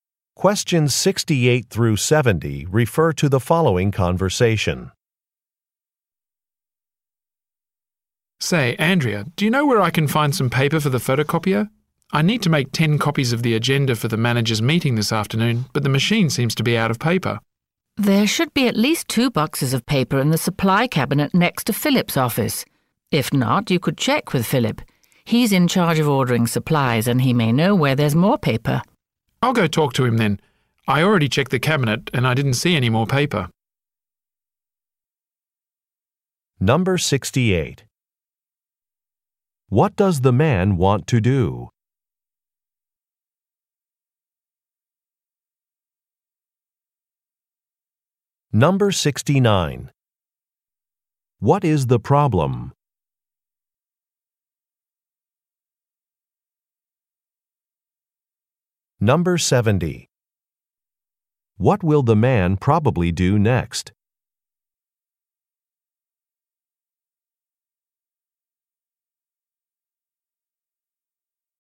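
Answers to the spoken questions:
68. Make 10 copies of the agenda for the managers' meeting
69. The photocopier is out of paper
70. Talk to Philip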